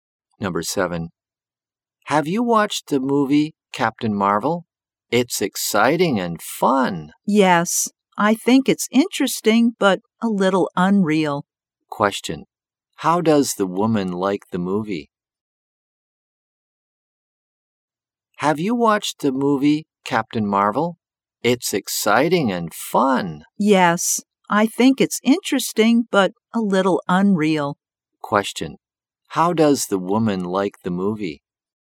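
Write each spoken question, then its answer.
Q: How does the woman like the movie?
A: Interesting but a little unreal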